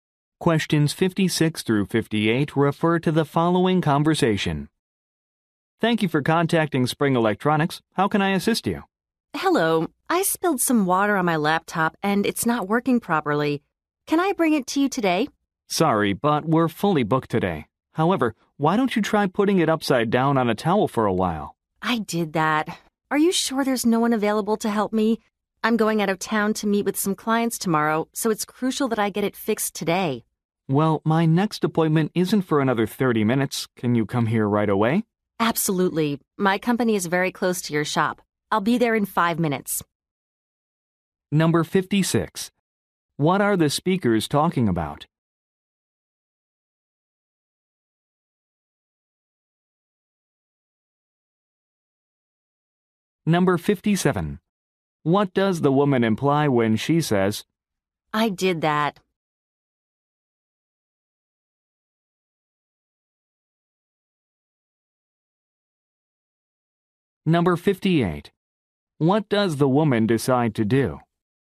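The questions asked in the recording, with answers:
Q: What are the speakers talking about?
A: Repairing a water-damaged laptop

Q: What does the woman decide to do?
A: Go to the shop right away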